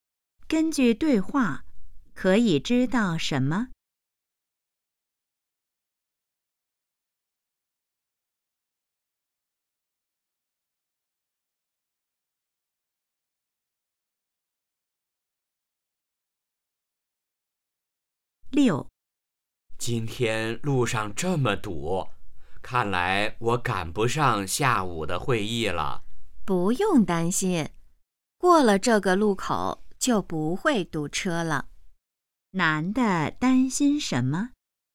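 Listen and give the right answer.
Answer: 赶不上下午的会议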